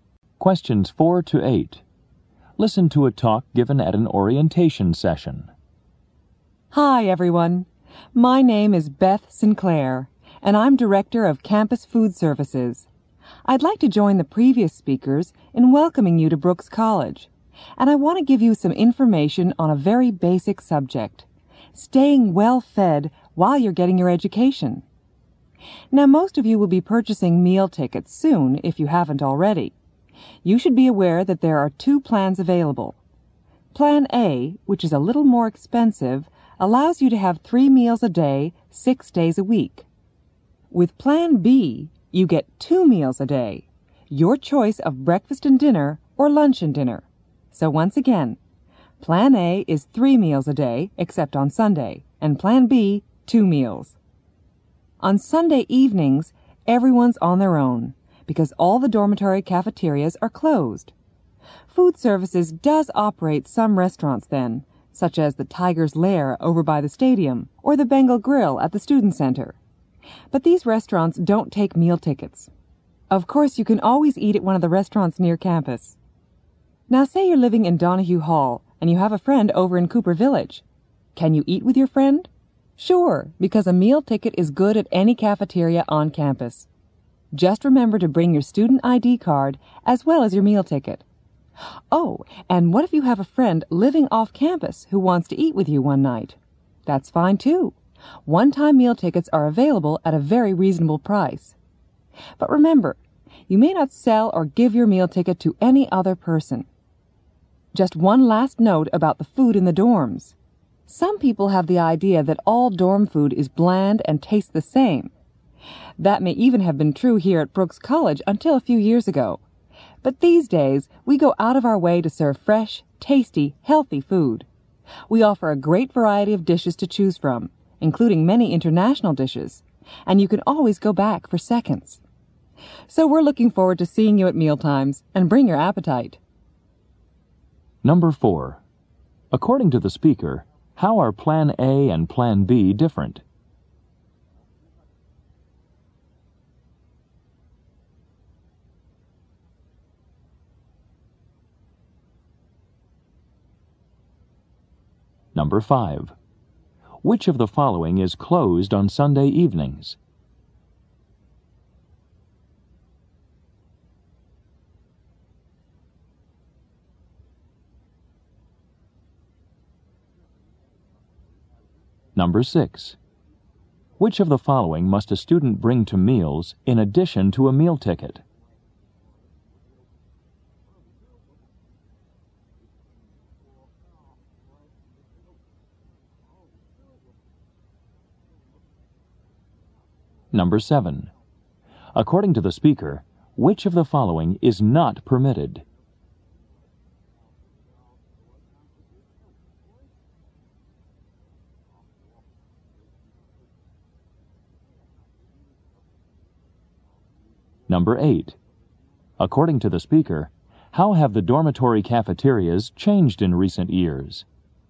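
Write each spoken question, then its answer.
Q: According to the speaker, how are Plan A and Plan B different?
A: Plan A gives 3 meals a day; Plan B gives 2.

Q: Which of the following is closed on Sunday evenings?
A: The dormitory cafeterias.

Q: Which of the following must a student bring to meals in addition to a meal ticket?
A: A student ID card.

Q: According to the speaker, which of the following is not permitted?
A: Selling or giving your meal ticket to another person.

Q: According to the speaker, how have the dormitory cafeterias changed in recent years?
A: They now serve fresh, tasty, healthy food with more variety.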